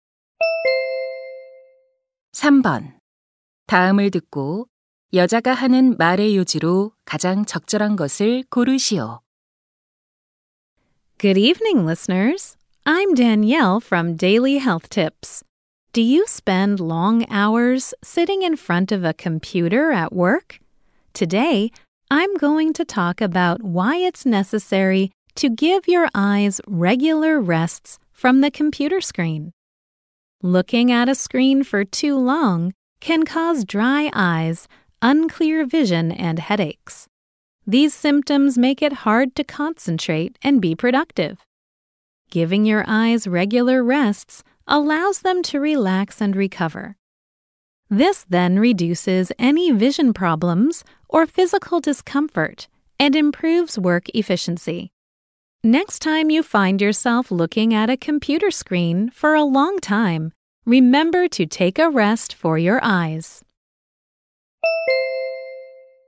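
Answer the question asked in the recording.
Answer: 컴퓨터 화면을 볼 때 눈을 규칙적으로 쉬게 해야 한다.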